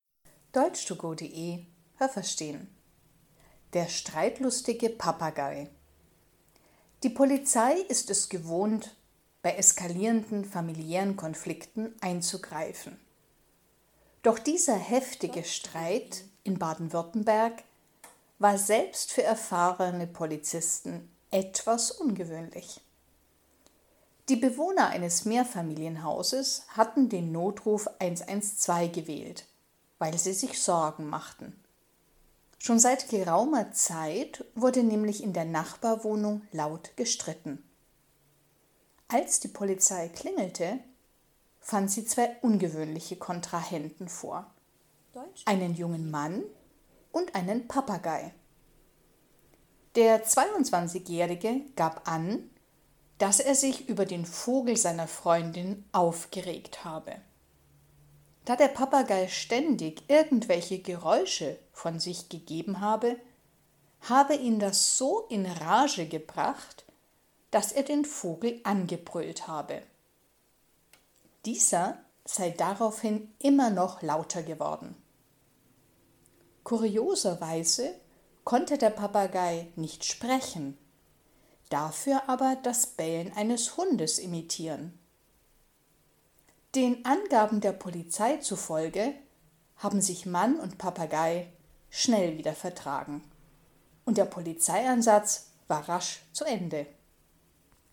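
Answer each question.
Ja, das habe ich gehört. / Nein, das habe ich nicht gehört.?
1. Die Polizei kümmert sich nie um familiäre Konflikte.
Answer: Nein, das habe ich nicht gehört.

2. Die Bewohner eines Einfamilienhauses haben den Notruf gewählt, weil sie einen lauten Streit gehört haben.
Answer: Nein, das habe ich nicht gehört.

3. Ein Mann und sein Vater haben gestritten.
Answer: Nein, das habe ich nicht gehört.

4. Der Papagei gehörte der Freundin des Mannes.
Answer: Ja, das habe ich gehört.

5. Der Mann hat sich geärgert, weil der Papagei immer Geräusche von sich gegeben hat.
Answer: Ja, das habe ich gehört.

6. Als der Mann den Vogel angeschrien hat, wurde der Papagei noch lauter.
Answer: Ja, das habe ich gehört.

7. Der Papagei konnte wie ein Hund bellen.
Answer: Ja, das habe ich gehört.

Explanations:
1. Es gehört zu ihren Aufgaben, bei eskalierenden familiären Konflikten einzugreifen.
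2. Das waren Bewohner eines Mehrfamilienhauses.
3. Ein Mann und ein Papagei haben gestritten.

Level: B1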